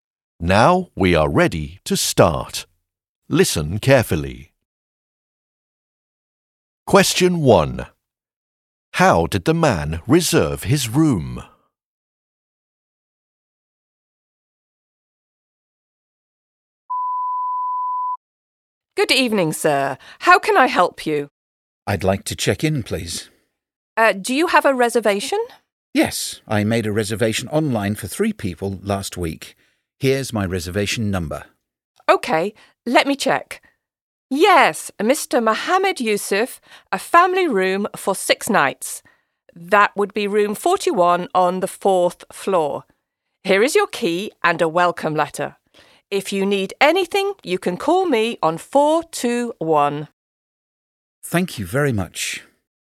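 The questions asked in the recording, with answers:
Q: How did the man reserve his room?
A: Online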